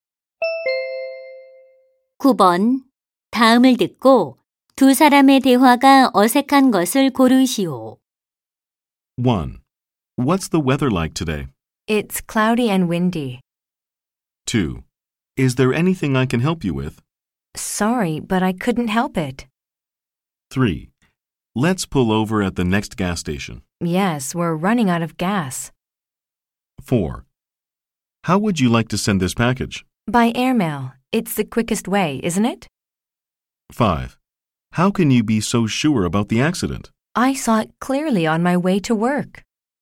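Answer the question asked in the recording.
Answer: 2: Is there anything I can help you with? / Sorry, but I couldn't help it.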